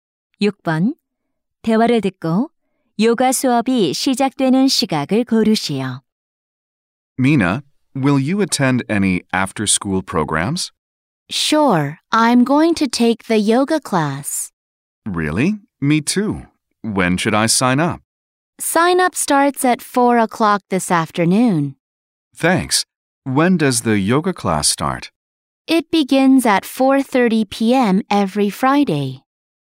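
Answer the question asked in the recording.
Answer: 오후 4시 30분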